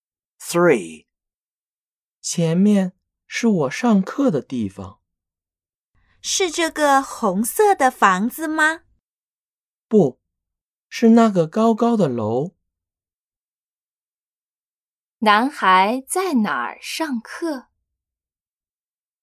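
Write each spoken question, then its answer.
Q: 男孩在哪儿上课?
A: 那个高高的楼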